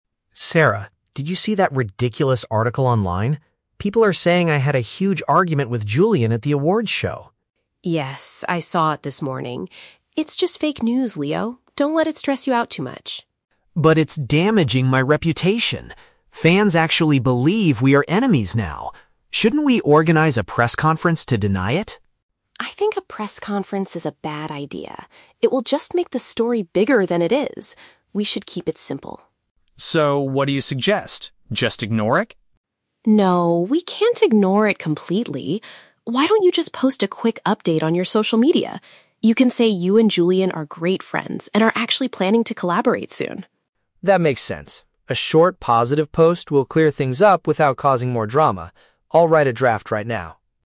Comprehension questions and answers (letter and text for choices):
Listen to a conversation between a singer and his PR manager. Choose the correct answer (A, B, or C) for each question.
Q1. What is the false rumor about Leo?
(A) He gave a terrible performance at a recent awards show.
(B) He had a serious conflict with another musician.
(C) He is planning to leave his current public relations agency.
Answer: (B) He had a serious conflict with another musician.

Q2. Why does Sarah advise against holding a press conference?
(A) She believes it would draw unnecessary attention to the rumor.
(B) She thinks it would cost the management team too much money.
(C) She knows that Julian refuses to speak directly to the media.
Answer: (A) She believes it would draw unnecessary attention to the rumor.

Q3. What do they finally decide to do to solve the problem?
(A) They will completely ignore the news until people forget it.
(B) They will immediately release a new song with Julian.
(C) Leo will share a brief, friendly message on the internet.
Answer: (C) Leo will share a brief, friendly message on the internet.

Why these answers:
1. Leo says people are claiming he "had a huge argument with Julian" (which paraphrases to having a serious conflict with another musician).
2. Sarah says a press conference is a bad idea because "It will just make the story bigger than it is" (which means it would draw unnecessary attention to the rumor).
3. Sarah suggests he "post a quick update on your social media" and Leo agrees to write a "short, positive post" (which paraphrases to sharing a brief, friendly message on the internet).

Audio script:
Leo: Sarah, did you see that ridiculous article online? People are saying I had a huge argument with Julian at the awards show!
Sarah: Yes, I saw it this morning. It's just fake news, Leo. Don't let it stress you out too much.
Leo: But it's damaging my reputation! Fans actually believe we are enemies now. Shouldn't we organize a press conference to deny it?
Sarah: I think a press conference is a bad idea. It will just make the story bigger than it is. We should keep it simple.
Leo: So, what do you suggest? Just ignore it?
Sarah: No, we can't ignore it completely. Why don't you just post a quick update on your social media? You can say you and Julian are great friends and are actually planning to collaborate soon.
Leo: That makes sense. A short, positive post will clear things up without causing more drama. I'll write a draft right now.